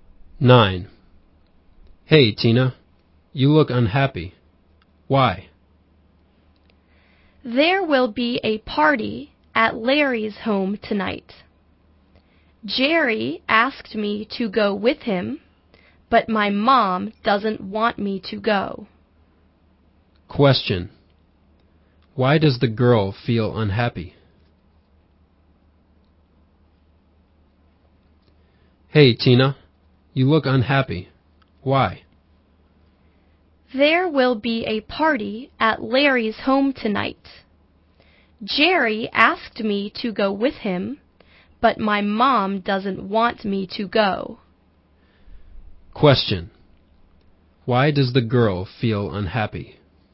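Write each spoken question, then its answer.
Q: Why does the girl feel unhappy?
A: Her mom doesn't want her to go to the party at Larry's home.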